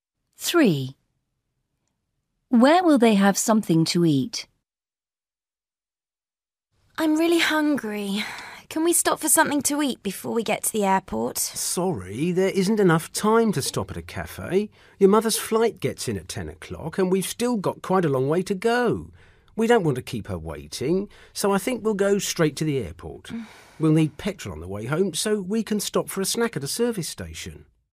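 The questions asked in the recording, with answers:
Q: Where will they have something to eat?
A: at a service station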